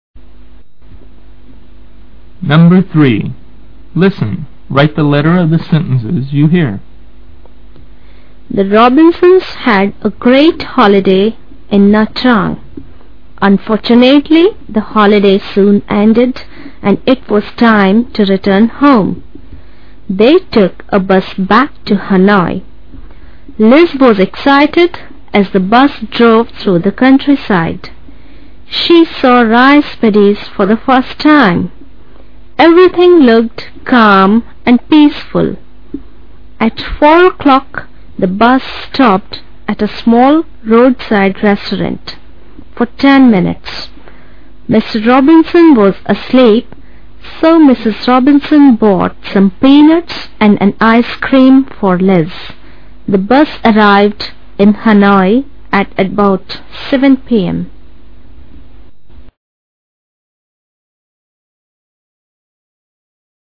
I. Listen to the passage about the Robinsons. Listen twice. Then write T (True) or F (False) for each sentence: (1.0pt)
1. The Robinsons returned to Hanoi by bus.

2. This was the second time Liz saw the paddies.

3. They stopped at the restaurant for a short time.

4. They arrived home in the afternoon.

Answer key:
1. True
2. False
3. True
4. False

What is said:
The Robinsons had a great holiday in Nha Trang. Unfortunately, the holiday soon ended and it was time to return home. They took a bus back to Hanoi. Liz was excited as the bus drove through the countryside. She saw rice paddies for the first time. Everything looked calm and peaceful. At four o'clock, the bus stopped at a small roadside restaurant for ten minutes. Mr Robinson was asleep, so Mrs Robinson bought some peanuts and an ice cream for Liz. The bus arrived in Hanoi at about 7 pm.

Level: lớp 7